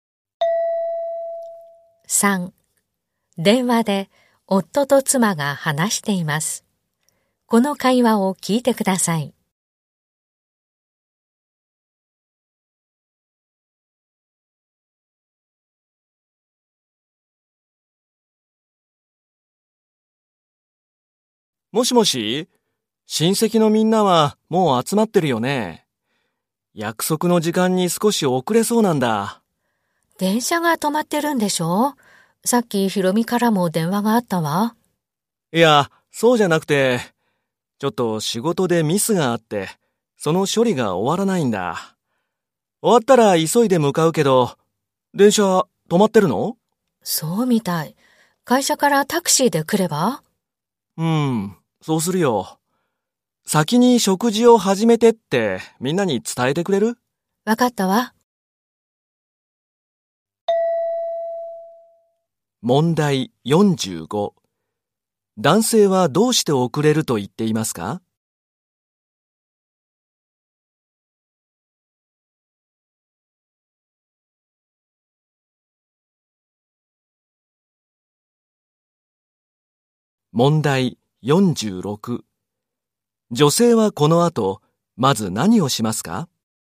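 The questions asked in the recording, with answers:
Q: 男性はどうして遅れると言っていますか?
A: 仕事のミスの処理が終わらないから

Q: 女性はこの後、まず何をしますか?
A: みんなに先に食事を始めるよう伝える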